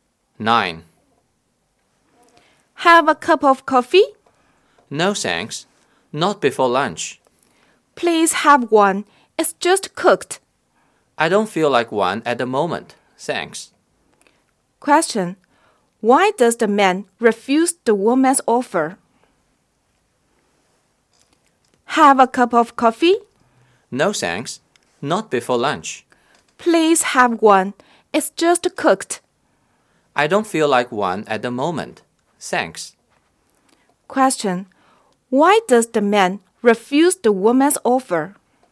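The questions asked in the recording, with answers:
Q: Why does the man refuse the woman's offer?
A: He doesn't want coffee before lunch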